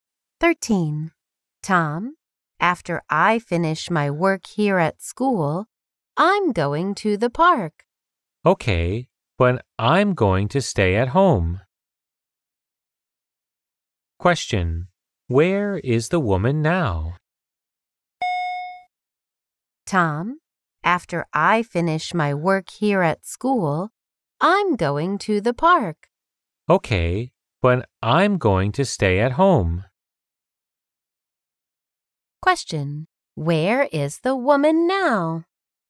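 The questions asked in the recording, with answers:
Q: Where is the woman now?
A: At school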